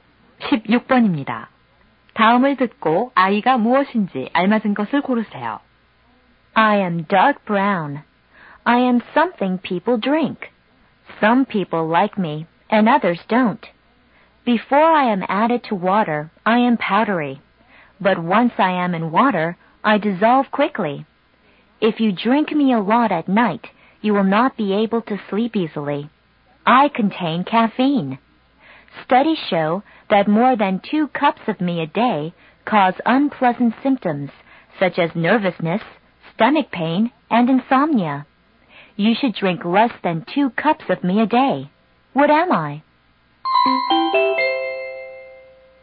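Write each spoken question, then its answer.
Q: 다음을 듣고 아이가 무엇인지 알맞은 것을 고르세요.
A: 커피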